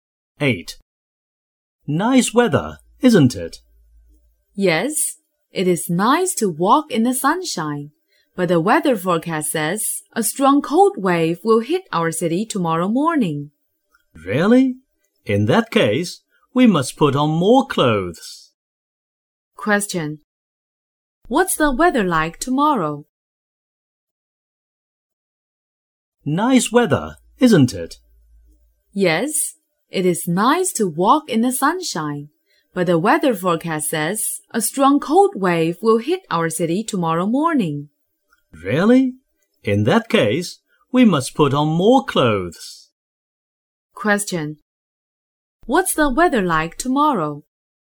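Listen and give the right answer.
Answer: Cold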